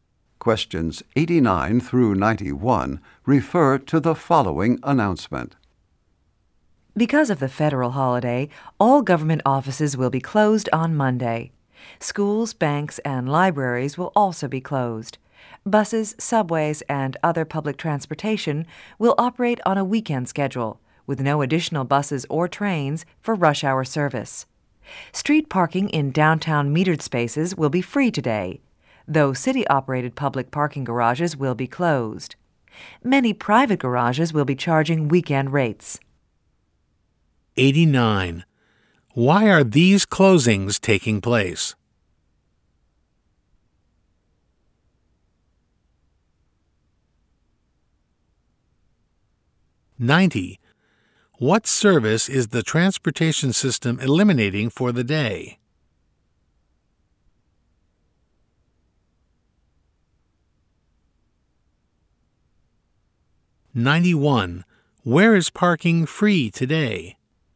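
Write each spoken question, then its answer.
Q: Why are these closings taking place?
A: Because of a federal holiday

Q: What service is the transportation system eliminating for the day?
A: Rush hour service

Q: Where is parking free today?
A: Downtown metered street spaces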